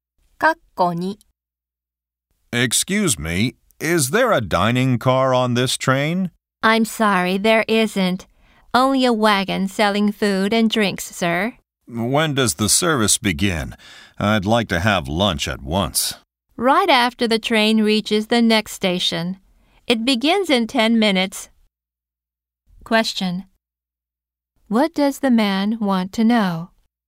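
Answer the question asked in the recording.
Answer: When the food and drink service begins.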